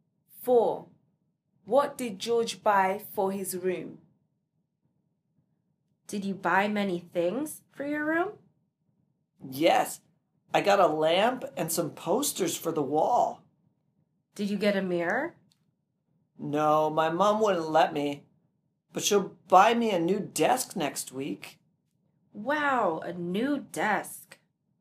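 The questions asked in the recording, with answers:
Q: What did George buy for his room?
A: A lamp and some posters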